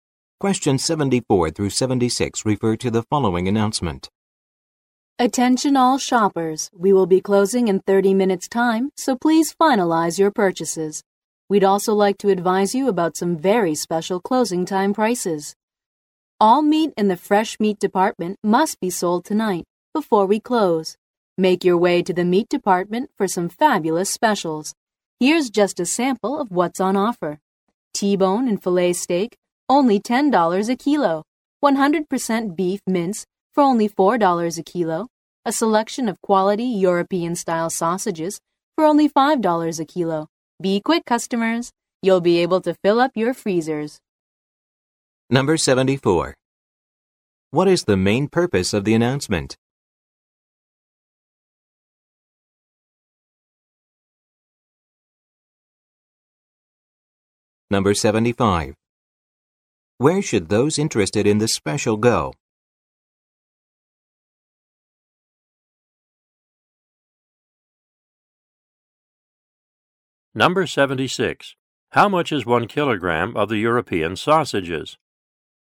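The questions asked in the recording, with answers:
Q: What is the main purpose of the announcement?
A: To announce closing time and meat specials

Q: Where should those interested in the special go?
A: The meat department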